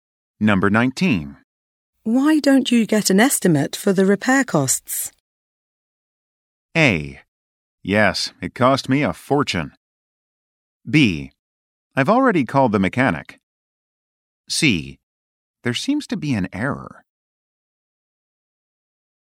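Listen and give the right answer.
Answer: B: I've already called the mechanic.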